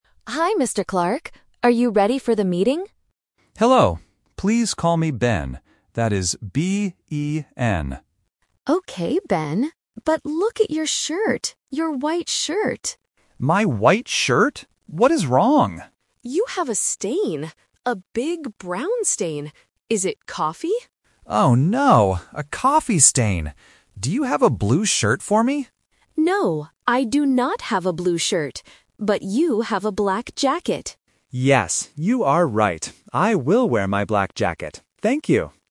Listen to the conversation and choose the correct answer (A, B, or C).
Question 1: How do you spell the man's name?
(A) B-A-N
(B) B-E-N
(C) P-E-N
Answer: (B) B-E-N

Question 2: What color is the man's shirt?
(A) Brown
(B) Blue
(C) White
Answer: (C) White

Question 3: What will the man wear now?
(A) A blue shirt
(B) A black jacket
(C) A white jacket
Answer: (B) A black jacket

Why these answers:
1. The man spells his name out loud: "That is B-E-N."
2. Colleague A says, "look at your shirt! Your white shirt."
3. Colleague A suggests the black jacket, and the man agrees: "I will wear my black jacket."

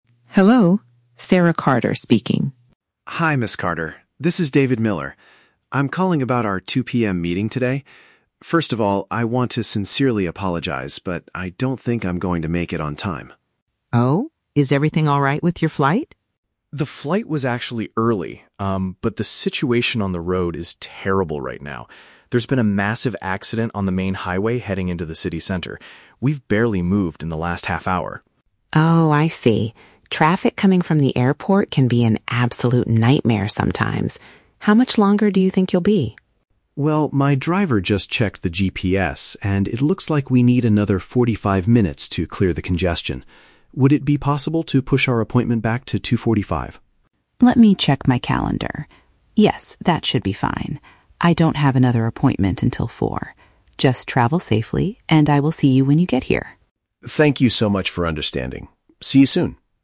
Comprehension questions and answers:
Listen to the phone conversation between a businessman and his client, then choose the correct answer (A, B, or C) for each question.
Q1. Why is the man apologizing to the woman?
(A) His morning flight arrived much later than expected.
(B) He is stuck in a severe traffic jam on his way to the city.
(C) He forgot to bring important documents for their meeting.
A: (B) He is stuck in a severe traffic jam on his way to the city.

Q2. What exactly caused the man's delay?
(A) A large vehicle collision on the road.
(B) The taxi driver getting lost without a map.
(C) Bad weather conditions near the airport.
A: (A) A large vehicle collision on the road.

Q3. What is the final result of the phone call?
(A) They decide to postpone the meeting until 4:00 PM.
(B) They agree to cancel the meeting and talk tomorrow.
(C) They agree to delay their scheduled discussion by 45 minutes.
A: (C) They agree to delay their scheduled discussion by 45 minutes.

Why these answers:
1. The man explains that the "situation on the road is terrible" and they have "barely moved in the last half hour." Option B correctly paraphrases this as being stuck in a severe traffic jam. The Trap (A): The woman asks about his flight, but he explicitly states, "The flight was actually early." Therefore, a late flight is not the reason he is apologizing. Plausible (C): Forgetting documents is a realistic reason to apologize before a business meeting, but it is never mentioned in the conversation.
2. The man states, "There's been a massive accident on the main highway." Option A uses synonyms (a large vehicle collision) to describe this exact event. The Trap (B): The driver and a map (GPS) are mentioned in the audio, but the driver is not lost. The driver used the GPS to check how long the delay would be. Plausible (C): Bad weather can easily cause travel delays, but the man does not mention the weather at all.
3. The man asks to "push our appointment back to 2:45" (which is 45 minutes later than the original 2:00 PM time), and the woman says, "Yes, that should be fine." Option C paraphrases this agreement to delay the discussion. The Trap (A): The time "4:00" is mentioned, but that is the time of the woman's next appointment with someone else, not the new time for their meeting. Plausible (B): Canceling a meeting is a common outcome when someone is very late, but the woman has free time, so they just delay it instead of canceling.

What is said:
Ms. Carter: Hello, Sarah Carter speaking.
Carter. This is David Miller. First of all, I want to sincerely apologize, but I don't think I'm going to make it on time.
Ms. Carter: Oh? Is everything alright with your flight?
David: The flight was actually early, um, but the situation on the road is terrible right now. There's been a massive accident on the main highway heading into the city center. We've barely moved in the last half hour.
Carter: Oh, I see. Traffic coming from the airport can be an absolute nightmare sometimes. How much longer do you think you'll be?
David: Well, my driver just checked the GPS, and it looks like we need another forty-five minutes to clear the congestion. Would it be possible to push our appointment back to 2:45?
Carter: Let me check my calendar... Yes, that should be fine. I don't have another appointment until 4:00. Just travel safely, and I will see you when you get here.

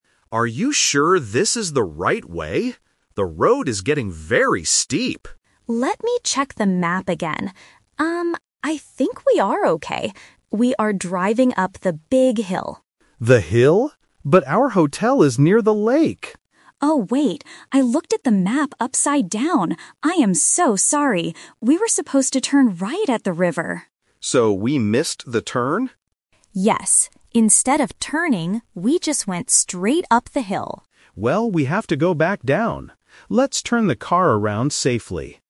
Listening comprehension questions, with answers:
Listen to the conversation between two people in a car. Choose the correct answer (A, B, or C) for each question.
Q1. Where are they trying to go?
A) To the big hill.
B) To a hotel near the lake.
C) To a campsite in the forest.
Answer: B) To a hotel near the lake.

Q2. What mistake did the woman make?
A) She looked at the map incorrectly.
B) She dropped the map in the river.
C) She told the man to drive faster.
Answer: A) She looked at the map incorrectly.

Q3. What should they have done at the river?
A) They should have gone straight.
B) They should have stopped the car.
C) They should have turned right.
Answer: C) They should have turned right.

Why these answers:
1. Why B is correct: The man explicitly says, "But our hotel is near the lake!" when he realizes they are going the wrong way. Why A is a trap: The "big hill" is where they are driving right now by mistake, not their actual destination. Why C is wrong: A campsite and a forest are not mentioned in the audio.
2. Why A is correct: The woman admits her mistake: "I looked at the map upside down." Why B is a trap: The word "river" is mentioned in the dialogue, but she didn't drop the map in it. Why C is wrong: Driving faster is never discussed.
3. Why C is correct: The woman states the correct direction they missed: "We were supposed to turn right at the river." Why A is a trap: "Went straight" is the mistake they actually made ("we just went straight up the hill"), not what they should have done. Why B is wrong: Stopping the car at the river is not mentioned as part of the directions.

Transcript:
Driver (Man): Are you sure this is the right way? The road is getting very steep.
Navigator (Woman): Let me check the map again. Um, I think we are okay. We are driving up the big hill.
Driver: The hill? But our hotel is near the lake!
Navigator: Oh, wait. I looked at the map upside down. I am so sorry! We were supposed to turn right at the river.
Driver: So we missed the turn?
Navigator: Yes. Instead of turning, we just went straight up the hill.

